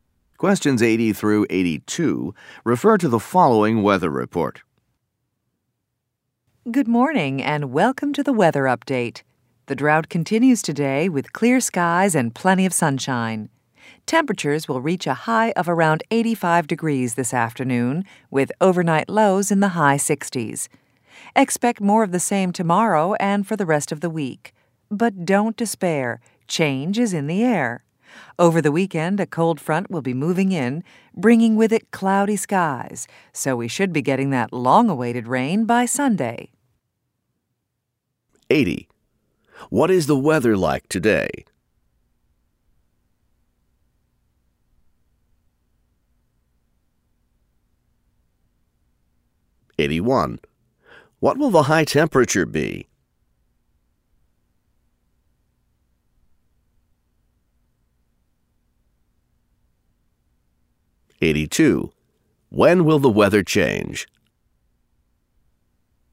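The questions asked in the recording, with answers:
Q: What is the weather like today?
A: Clear and sunny

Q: What will the high temperature be?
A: Around 85 degrees

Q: When will the weather change?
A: Over the weekend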